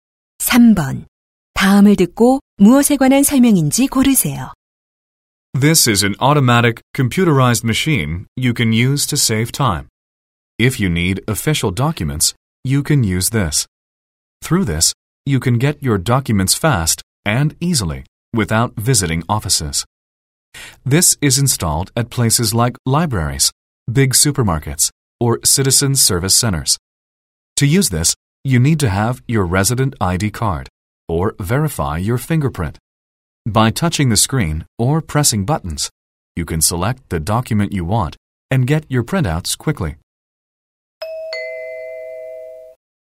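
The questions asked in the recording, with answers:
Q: 다음을 듣고 무엇에 관한 설명인지 고르세요.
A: 무인 민원 서류 발급기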